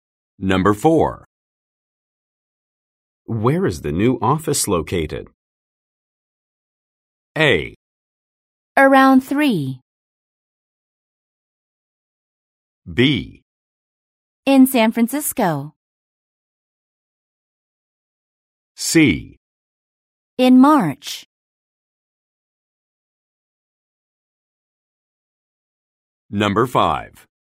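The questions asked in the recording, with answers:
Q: Where is the new office located?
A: B: In San Francisco.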